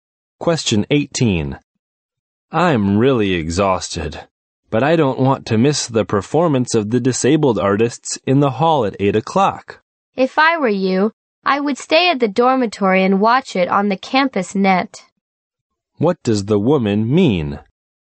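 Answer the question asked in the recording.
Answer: The man should stay in the dorm and watch it on the campus net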